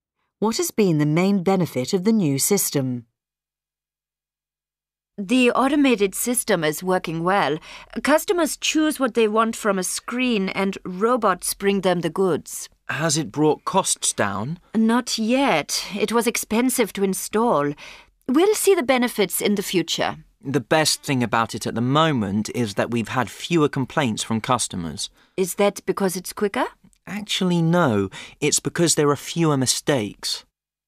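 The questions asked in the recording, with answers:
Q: What has been the main benefit of the new system?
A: There have been fewer mistakes, so fewer complaints from customers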